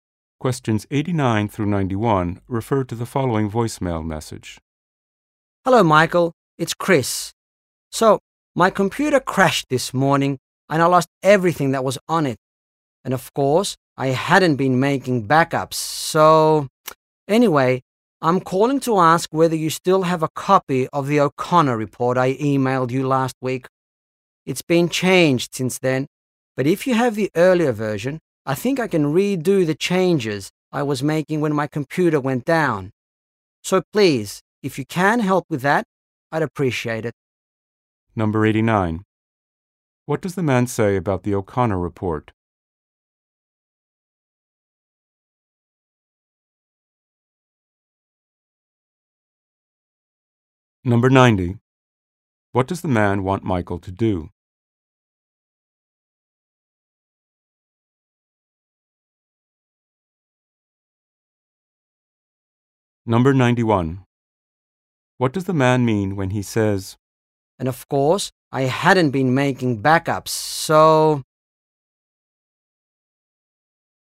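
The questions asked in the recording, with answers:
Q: What does the man say about the O'Connor report?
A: It has changed since he emailed it last week

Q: What does the man want Michael to do?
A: Send him the earlier copy of the report

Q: What does the man mean when he says,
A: He has no copy of his lost work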